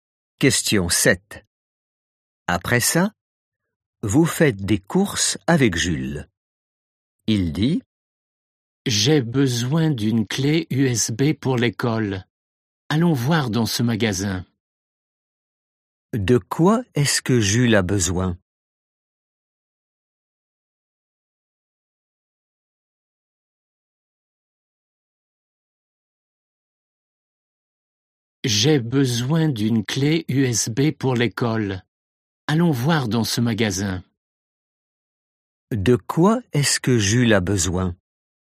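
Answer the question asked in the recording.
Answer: d'une clé USB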